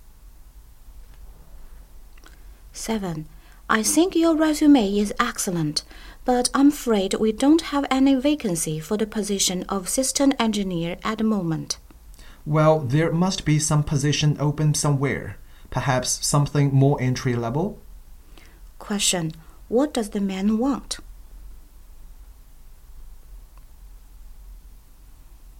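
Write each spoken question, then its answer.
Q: What does the man want?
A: Any job, even an entry-level position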